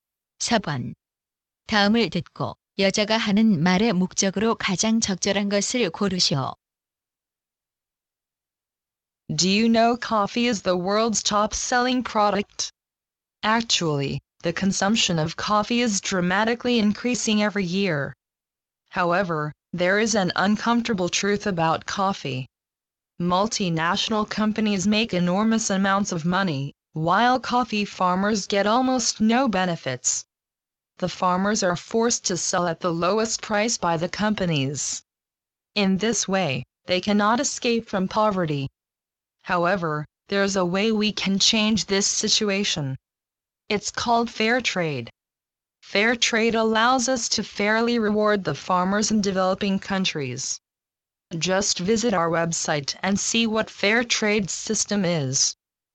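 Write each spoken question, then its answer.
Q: 다음을 듣고 여자가 하는 말의 목적으로 가장 적절한 것을 고르시오.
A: 공정 무역 참여를 권장하려고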